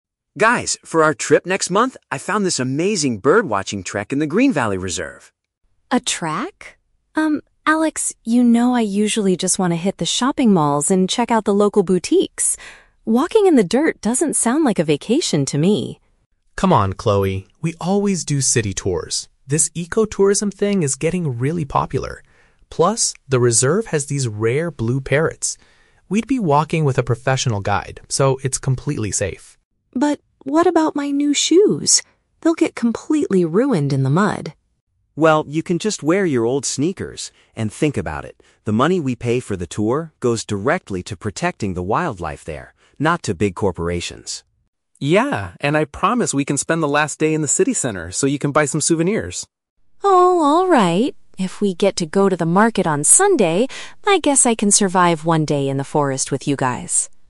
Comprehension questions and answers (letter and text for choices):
Listen to three friends discussing their upcoming trip. Choose the correct answer (A, B, or C) for each question.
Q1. What does Chloe normally prefer doing on holiday?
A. Visiting stores to buy things.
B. Looking at rare animals in the wild.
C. Relaxing at luxury cafes.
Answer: A. Visiting stores to buy things.

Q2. According to Alex, how does the trekking tour help the local area?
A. It provides new jobs for people in the city center.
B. The funds are used to keep the animals safe.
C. It stops big companies from building new hotels.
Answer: B. The funds are used to keep the animals safe.

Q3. Why does Chloe finally agree to join the forest walk?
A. Because she wants to try out her new shoes.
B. Because she doesn't want to stay in the hotel alone.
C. Because the group will visit a shopping area before they leave.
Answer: C. Because the group will visit a shopping area before they leave.

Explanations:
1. Chloe states that she usually wants to "hit the shopping malls and check out the local boutiques." This is paraphrased as "visiting stores to buy things." Why traps are wrong: Option B is a trap; looking at animals is Alex and Sam's idea, which Chloe initially dislikes. Option C is a plausible vacation activity but is never mentioned in the conversation.
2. Alex explains that the money they pay "goes directly to protecting the wildlife." "Protecting the wildlife" is paraphrased as "keep the animals safe." Why traps are wrong: Option A is a trap because the "city center" is mentioned later by Sam, but not in relation to jobs. Option C mentions "big companies" (corporations), but the audio doesn't say the tour stops them from building hotels.
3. Sam promises they will spend the last day in the city center to buy souvenirs, and Chloe agrees by saying, "If we get to go to the market on Sunday, I guess I can survive..." Why traps are wrong: Option A is the exact opposite of the truth; Chloe is worried her new shoes will get "ruined" in the mud. Option B is plausible, but she never expresses a fear of being left alone.

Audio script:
Alex: Guys, for our trip next month, I found this amazing bird-watching trek in the Green Valley reserve.
Chloe: A trek? Um, Alex, you know I usually just want to hit the shopping malls and check out the local boutiques. Walking in the dirt doesn't sound like a vacation to me.
Sam: Come on, Chloe. We always do city tours. This ecotourism thing is getting really popular. Plus, the reserve has these rare blue parrots. We'd be walking with a professional guide, so it's completely safe.
Chloe: But... what about my new shoes? They'll get completely ruined in the mud.
Alex: Well, you can just wear your old sneakers. And think about it: the money we pay for the tour goes directly to protecting the wildlife there, not to big corporations.
Sam: Yeah, and I promise we can spend the last day in the city center so you can buy some souvenirs.
If we get to go to the market on Sunday, I guess I can survive one day in the forest with you guys.